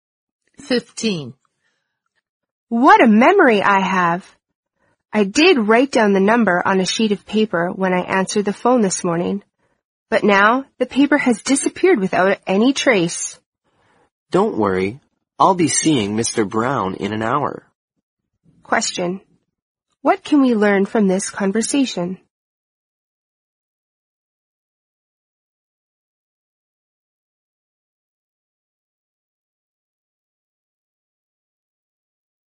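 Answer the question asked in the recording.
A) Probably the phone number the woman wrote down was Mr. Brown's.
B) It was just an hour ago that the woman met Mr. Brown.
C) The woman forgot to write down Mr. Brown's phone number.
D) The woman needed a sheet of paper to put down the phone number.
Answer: A) Probably the phone number the woman wrote down was Mr. Brown's.

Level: 四级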